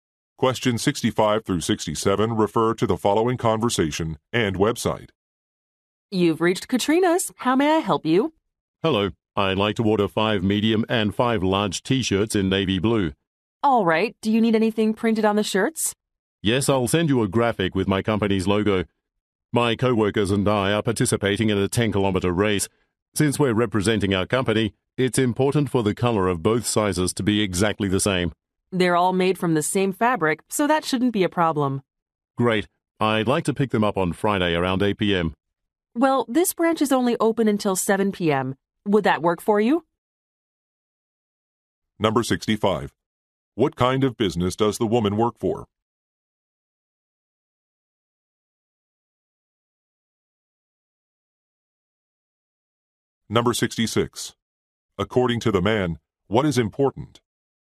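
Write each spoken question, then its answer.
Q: What kind of business does the woman work for?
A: A T-shirt printing business

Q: According to the man, what is important?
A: The shirts' color being exactly the same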